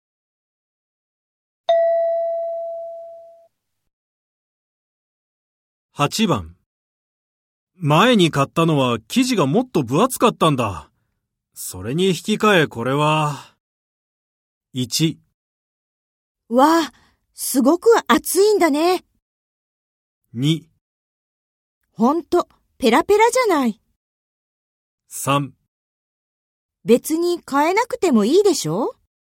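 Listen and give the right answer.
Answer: 2: ほんと、ペラペラじゃない。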